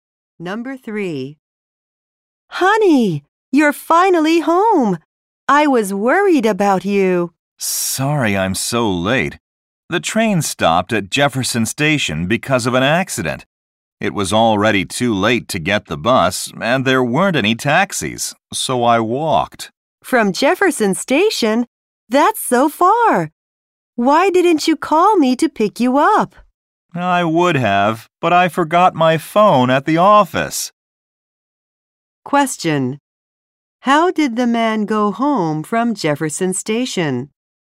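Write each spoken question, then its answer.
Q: How did the man go home from Jefferson Station?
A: He walked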